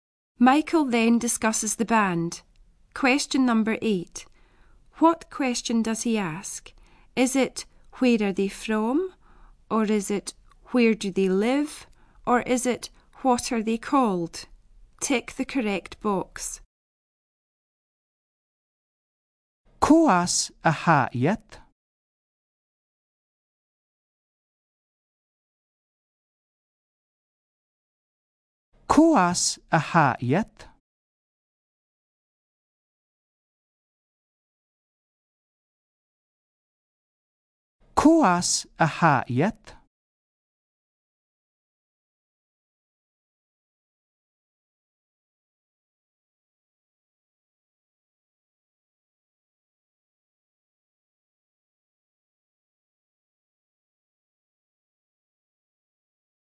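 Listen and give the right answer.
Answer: A: where are they from?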